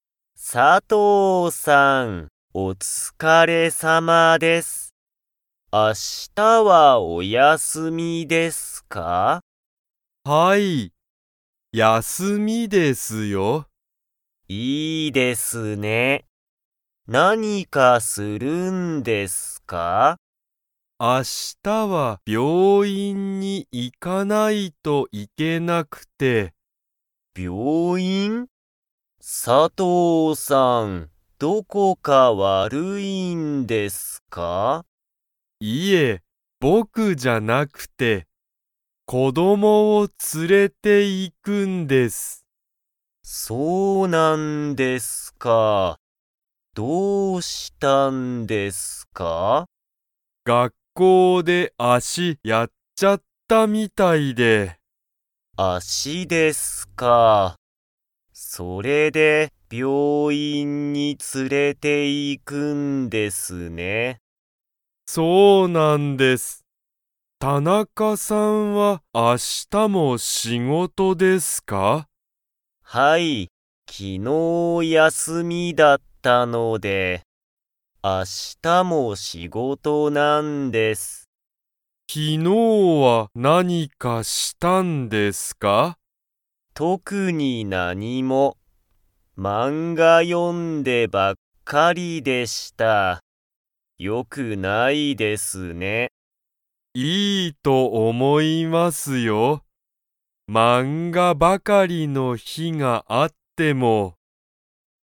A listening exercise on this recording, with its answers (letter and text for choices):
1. 佐藤(さとう)さんは、明日(あした)は____に行(い)かないといけない。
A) 病院(びょういん)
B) 仕事(しごと)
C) 休(やす)み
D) 子供(こども)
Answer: A) 病院(びょういん)

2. 田中(たなか)さんは、明日(あした)はお休(やす)みですか?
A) はい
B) いいえ))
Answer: B) いいえ))

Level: Level 2